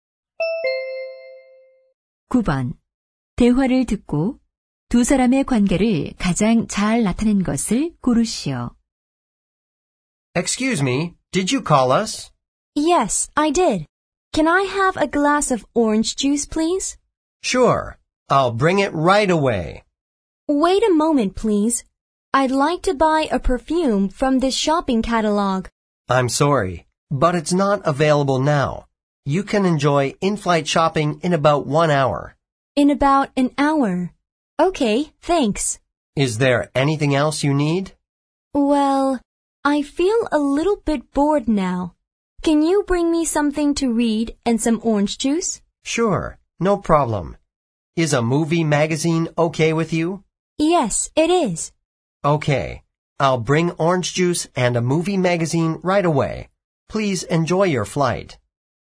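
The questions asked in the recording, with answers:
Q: 대화를 듣고 두 사람의 관계를 가장 잘 나타낸 것을 고르시오.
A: 승무원과 승객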